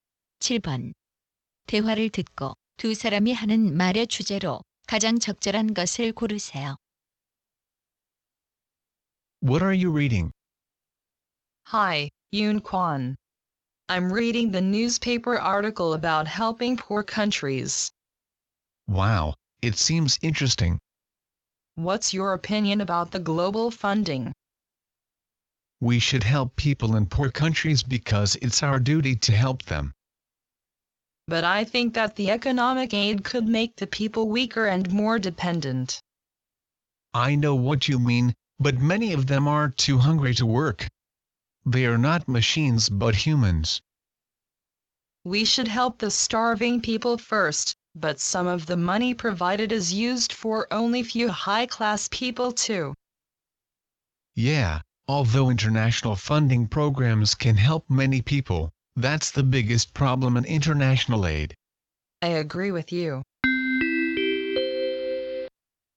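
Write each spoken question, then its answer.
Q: 대화를 듣고 두 사람이 하는 말의 주제로 가장 적절한 것을 고르세요.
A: 빈곤국에 대한 국제 원조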